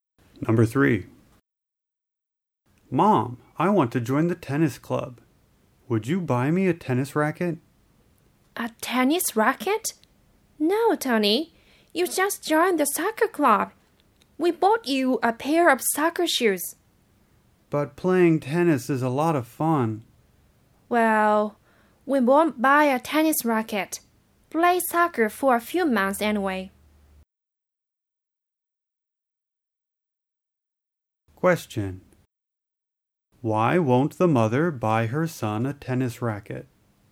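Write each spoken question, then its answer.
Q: Why won't the mother buy her son a tennis racket?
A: Because he just joined the soccer club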